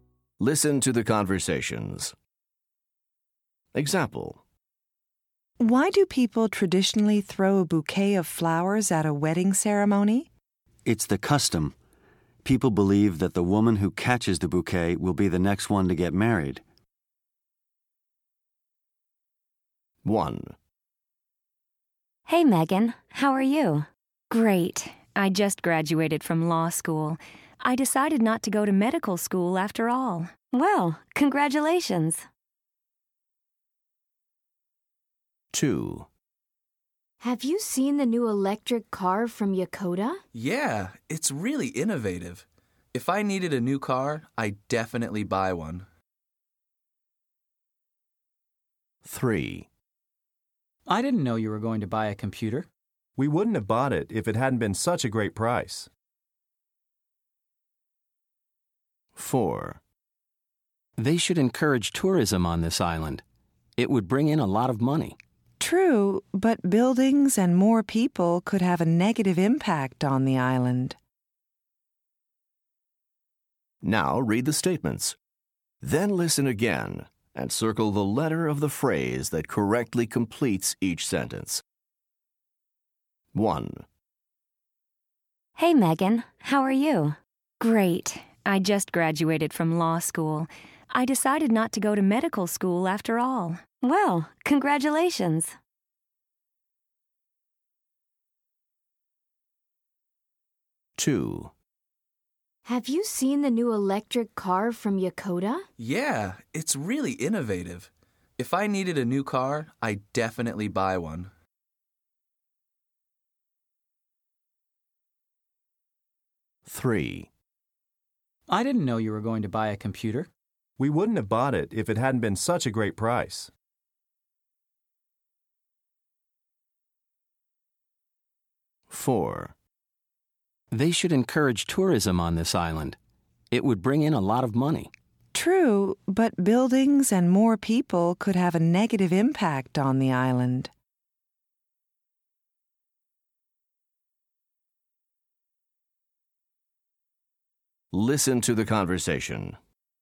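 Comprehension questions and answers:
Listen to the conversations. Choose the phrase that correctly completes each sentence.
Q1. Megan thought she would be a doctor, but she ...................... .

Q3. The people bought the computer .............. a great price.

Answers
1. decided not to go to medical school / became a lawyer
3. because it was

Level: Top Notch 3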